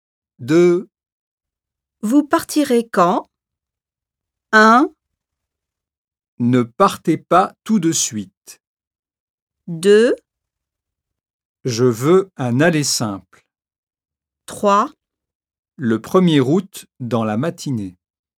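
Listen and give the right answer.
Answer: 3: Le 1er août dans la matinée.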